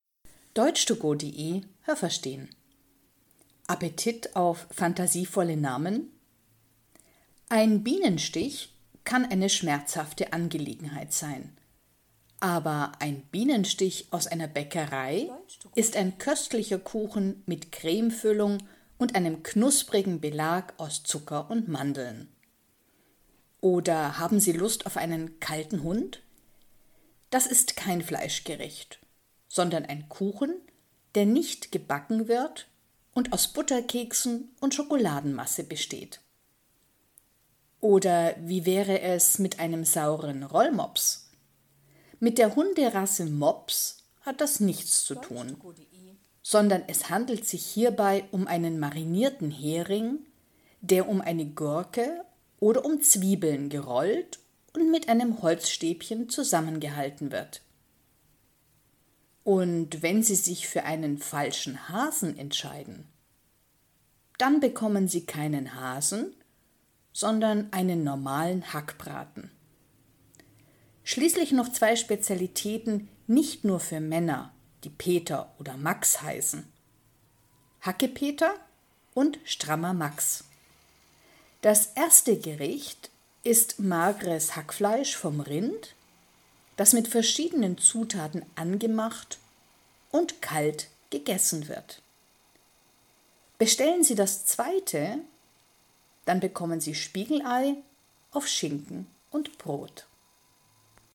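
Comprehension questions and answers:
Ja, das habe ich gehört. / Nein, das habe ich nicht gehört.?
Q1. Ein Bienenstich kann ein Stich von einer Biene sein oder ein Kuchen mit Cremefüllung. Haben Sie das gehört? Stimmt diese Aussage?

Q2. Ein Kalter Hund ist ein kaltes, süßes Fleischgericht. Haben Sie das gehört? Stimmt diese Aussage?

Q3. Ein Rollmops ist ein saurer Hering, der zusammengerollt wird. Haben Sie das gehört? Stimmt diese Aussage?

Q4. Ein Falscher Hase ist ein Fleischgericht, aber nicht aus Hasenfleisch. Haben Sie das gehört? Stimmt diese Aussage?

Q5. Ein Strammer Max ist Brot mit Hackfleisch vom Rind und einem Spiegelei. Haben Sie das gehört? Stimmt diese Aussage?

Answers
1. Ja, das habe ich gehört.
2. Nein, das habe ich nicht gehört.
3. Ja, das habe ich gehört.
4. Ja, das habe ich gehört.
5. Nein, das habe ich nicht gehört.

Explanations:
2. Das ist ein Kuchen aus Schokolade und Keksen.
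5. Das ist ein Spiegelei auf Schinken und Brot.

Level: B1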